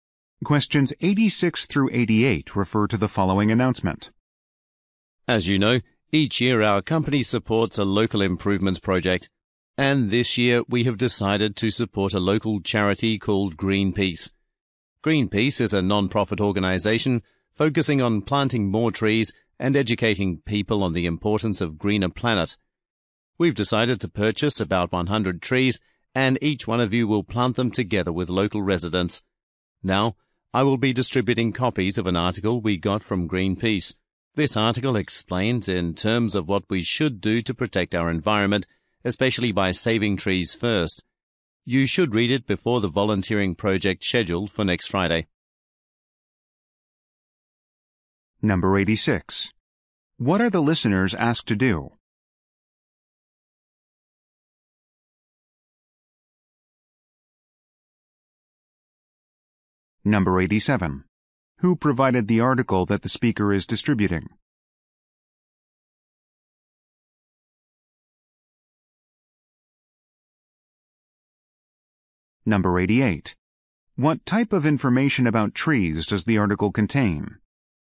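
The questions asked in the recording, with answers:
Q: What are the listeners asked to do?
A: Read the article before the volunteering project

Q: Who provided the article that the speaker is distributing?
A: Greenpeace

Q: What type of information about trees does the article contain?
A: How to protect the environment by saving trees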